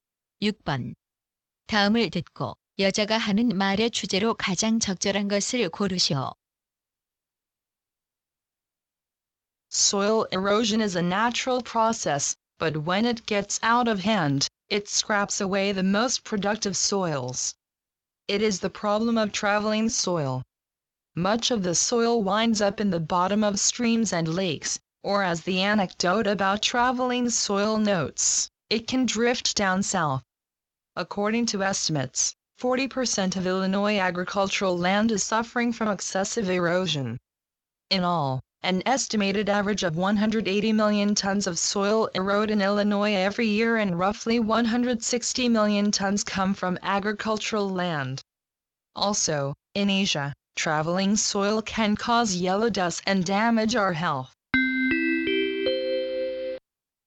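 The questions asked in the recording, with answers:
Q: 다음을 듣고 여자가 하는 말의 주제로 가장 적절한 것을 고르시오.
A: 토양 침식의 문제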